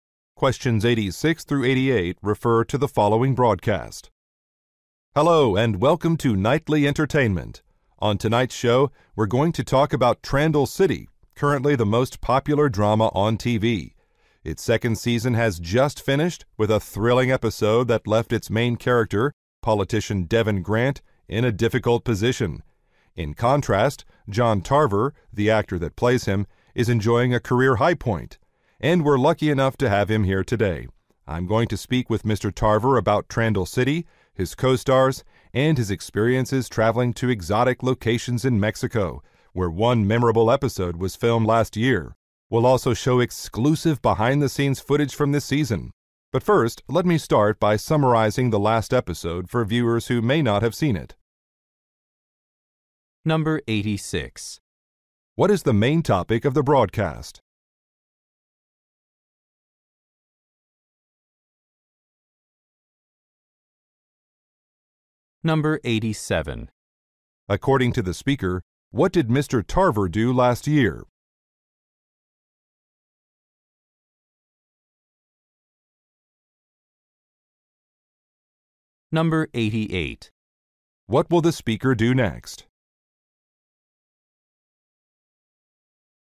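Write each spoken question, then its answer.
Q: What is the main topic of the broadcast?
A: The TV drama Trandall City

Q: According to the speaker, what did Mr.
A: He filmed an episode in Mexico

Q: What will the speaker do next?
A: Summarize the last episode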